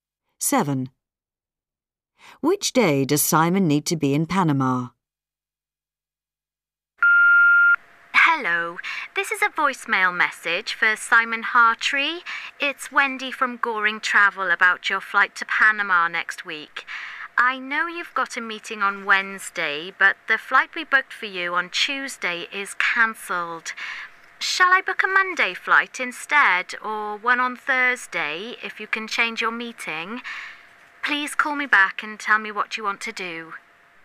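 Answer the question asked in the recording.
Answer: Wednesday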